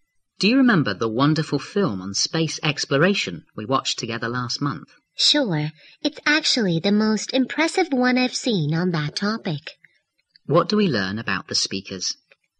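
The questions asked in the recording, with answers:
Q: What do we learn about the speakers?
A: They watched an impressive space exploration film together last month.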